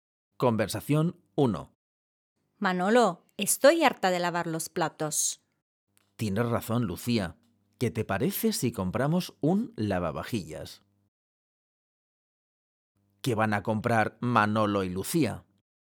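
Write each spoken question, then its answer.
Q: ¿Qué van a comprar Manolo y Lucía?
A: Un lavavajillas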